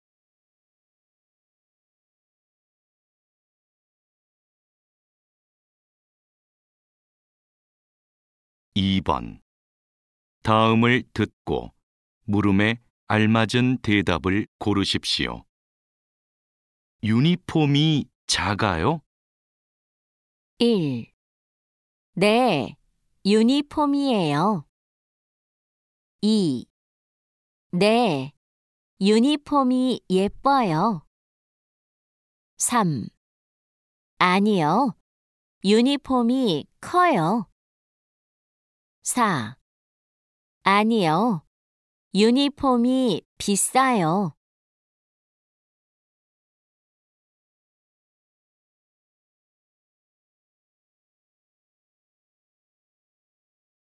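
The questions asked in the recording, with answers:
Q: 유니폼이 작아요?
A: 3: 아니요, 유니폼이 커요.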